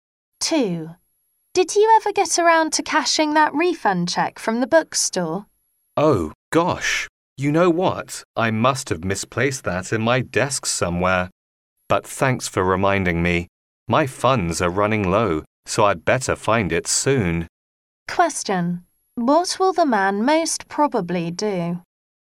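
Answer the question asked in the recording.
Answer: Look for the refund check in his desk.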